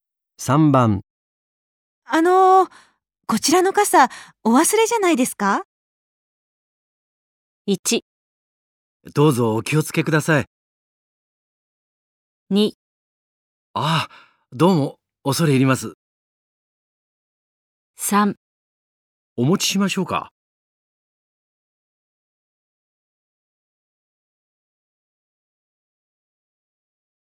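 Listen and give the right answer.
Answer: 2: ああ、どうも、恐れ入ります。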